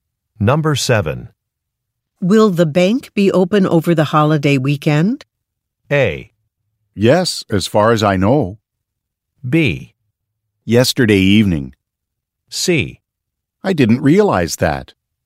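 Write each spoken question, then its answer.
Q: Will the bank be open over the holiday weekend?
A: A: Yes, as far as I know.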